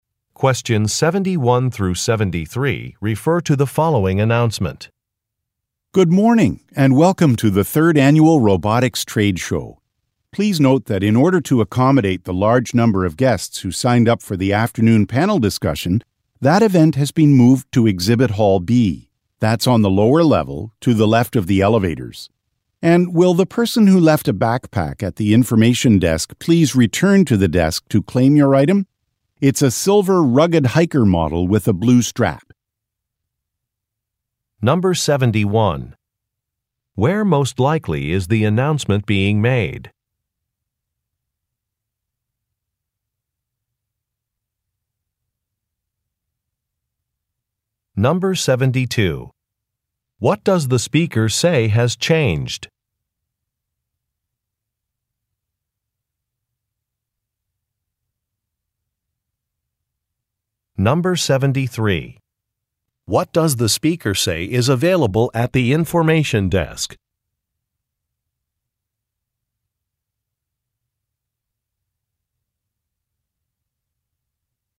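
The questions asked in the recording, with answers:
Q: Where most likely is the announcement being made?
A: At a robotics trade show

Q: What does the speaker say has changed?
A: The location of the afternoon panel discussion (moved to Exhibit Hall B)

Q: What does the speaker say is available at the information desk?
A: A lost backpack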